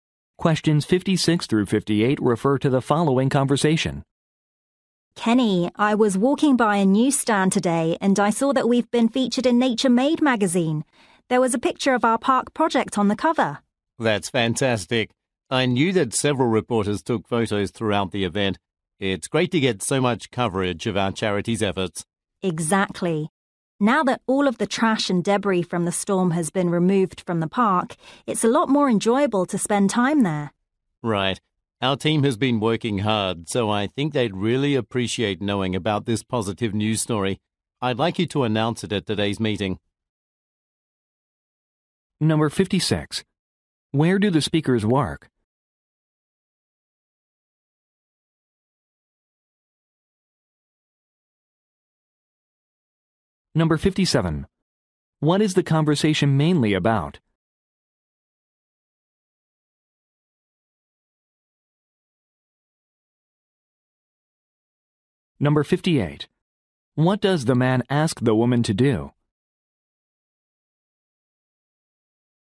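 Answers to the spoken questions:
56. At a charity
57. A magazine article featuring their park project
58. Announce the news at today's meeting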